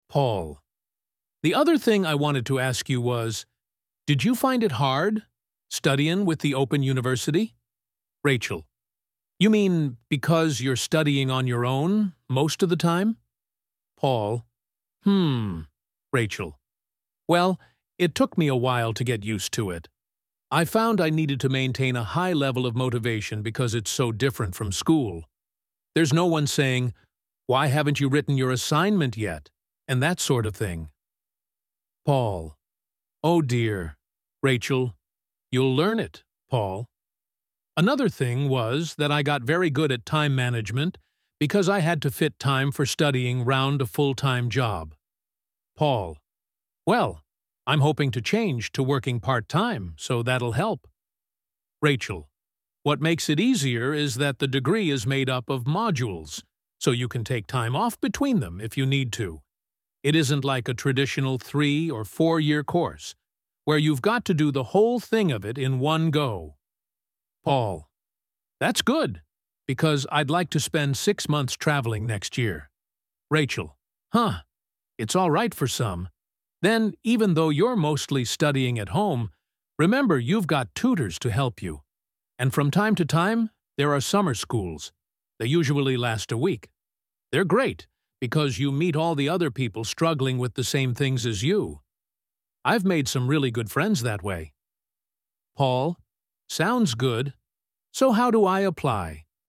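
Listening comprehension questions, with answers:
Questions 21-24. Choose the correct letter, A, B or C.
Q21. What was demanded while studying with the Open University?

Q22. Studying and working at the same time helped in improving what skills of Rachel?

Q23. Why did Rachel find it easier to pursue her degree at the Open University?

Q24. What was Paul's plan for next year for which he was thinking of joining the Open University?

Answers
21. a high level of motivation
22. time management
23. the degree is made up of modules
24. to spend 6 months traveling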